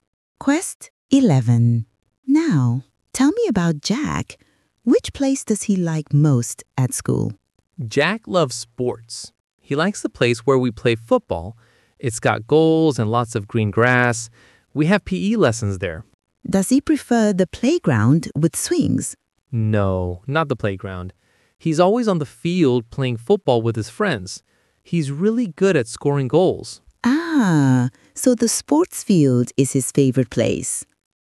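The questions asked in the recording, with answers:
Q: Which place does he like most at school?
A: the sports field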